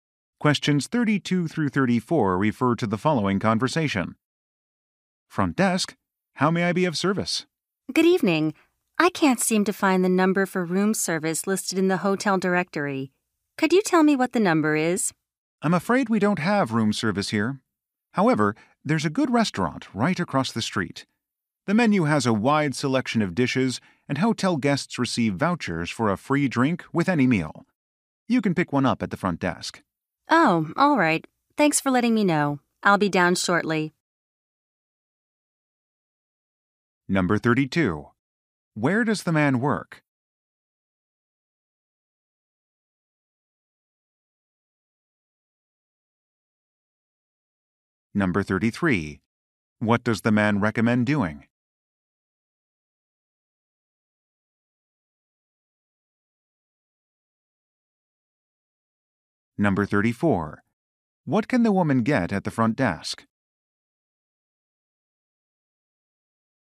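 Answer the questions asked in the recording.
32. At a hotel front desk
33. Eating at the restaurant across the street
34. A voucher for a free drink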